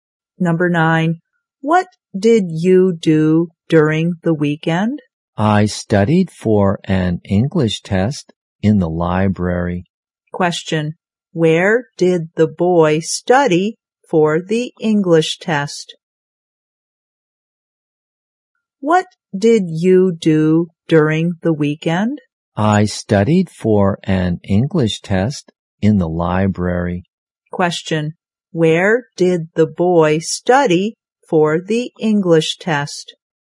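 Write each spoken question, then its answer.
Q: Where did the boy study for the English test?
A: In the library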